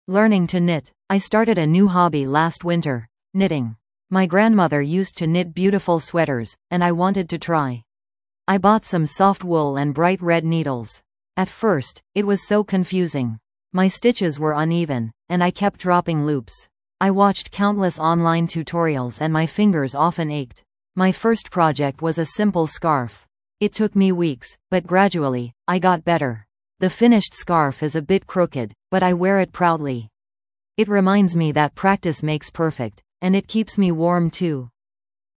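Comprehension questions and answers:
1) What was the speaker's first project?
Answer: A simple scarf

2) How does the speaker feel about her finished project?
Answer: She is proud of it, even though it is a bit crooked

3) What helped the speaker improve her knitting skills?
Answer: Watching countless online tutorials and practice

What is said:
Learning to Knit
I started a new hobby last winter: knitting. My grandmother used to knit beautiful sweaters, and I wanted to try. I bought some soft wool and bright red needles. At first, it was so confusing! My stitches were uneven, and I kept dropping loops. I watched countless online tutorials and my fingers often ached. My first project was a simple scarf. It took me weeks, but gradually, I got better. The finished scarf is a bit crooked, but I wear it proudly. It reminds me that practice makes perfect, and it keeps me warm too!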